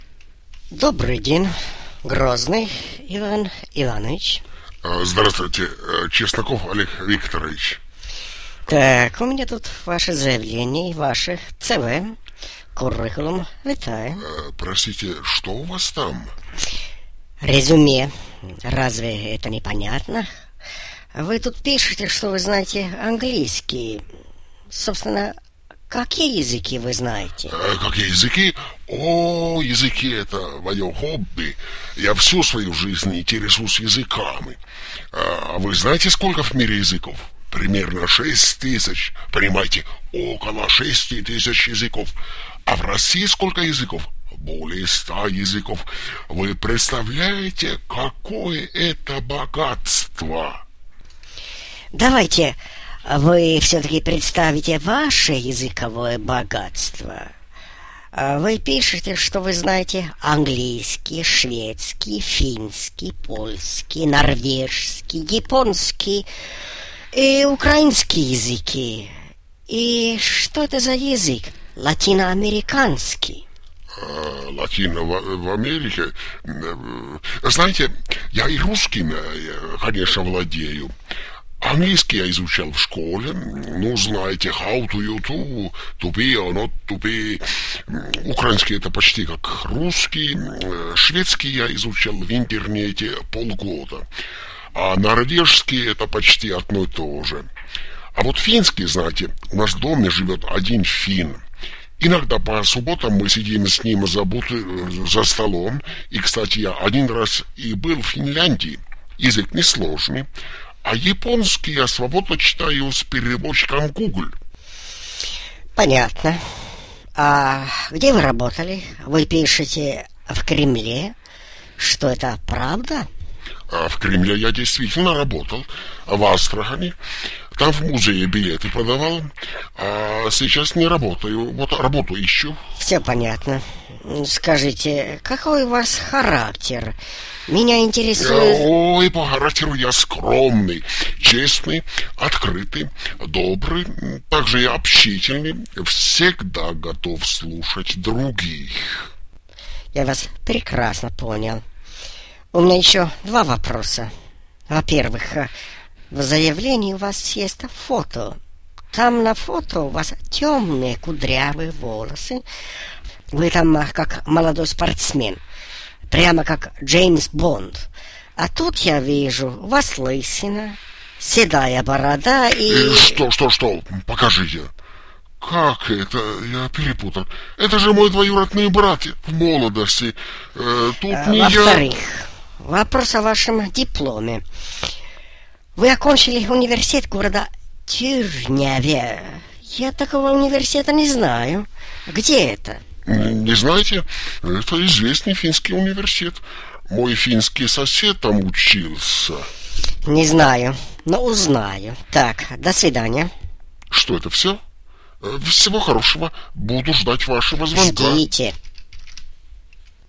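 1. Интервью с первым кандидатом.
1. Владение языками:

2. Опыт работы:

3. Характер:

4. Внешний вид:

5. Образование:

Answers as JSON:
{"1": "английский, шведский, финский, польский, норвежский, японский, украинский (плохо); русский", "2": "продавал билеты в музее в Кремле в Астрахани; сейчас не работает", "3": "скромный, честный, открытый, добрый, общительный", "4": "лысина, седая борода", "5": "университет города Тюрняве (неизвестный)"}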